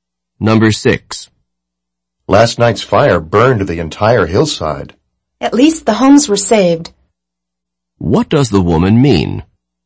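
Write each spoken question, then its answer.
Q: What does the woman mean?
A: The homes weren't burned, which is some consolation.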